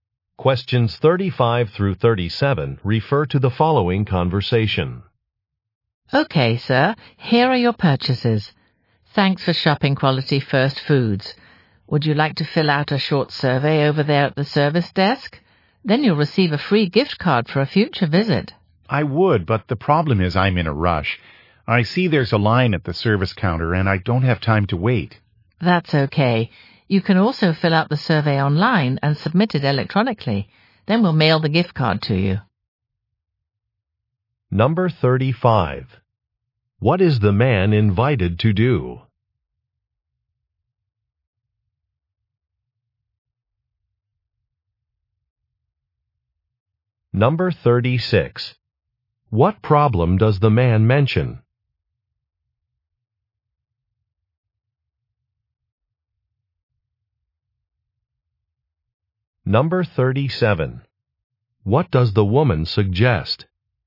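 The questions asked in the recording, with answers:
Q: What is the man invited to do?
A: Fill out a short survey

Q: What problem does the man mention?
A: He is in a rush and has no time to wait in line

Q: What does the woman suggest?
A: Filling out the survey online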